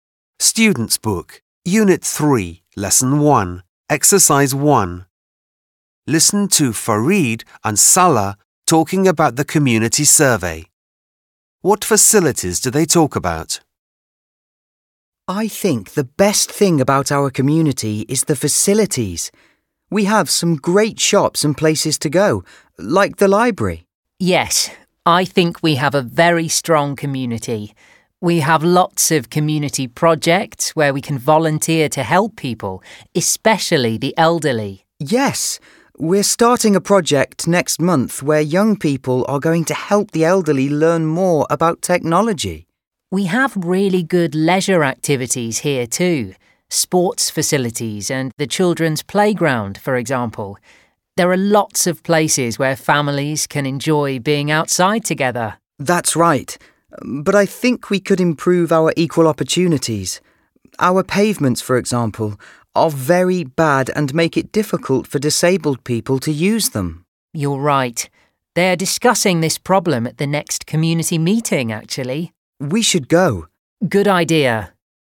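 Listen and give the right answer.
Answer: Shops, the library, sports facilities and the children's playground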